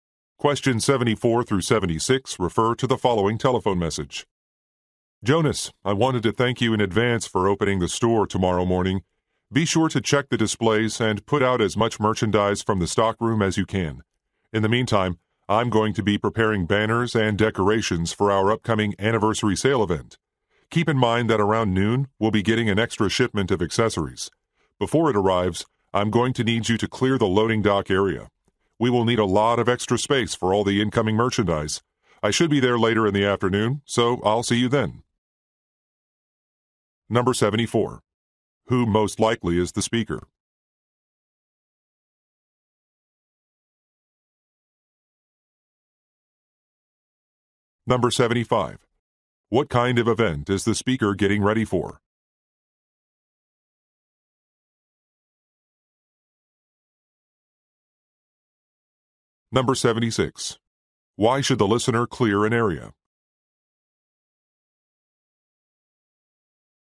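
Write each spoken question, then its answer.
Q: What kind of event is the speaker getting ready for?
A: An anniversary sale

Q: Why should the listener clear an area?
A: To make space for an incoming shipment of accessories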